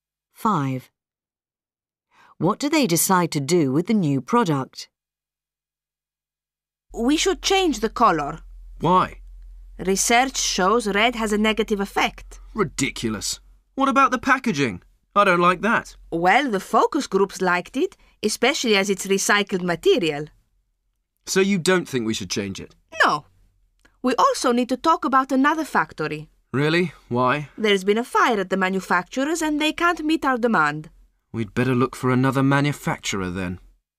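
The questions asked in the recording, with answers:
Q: What do they decide to do with the new product?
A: Look for another manufacturer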